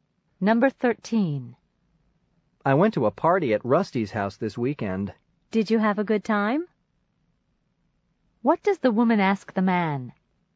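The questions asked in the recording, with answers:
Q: What does the woman ask the man?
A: Whether he had a good time at the party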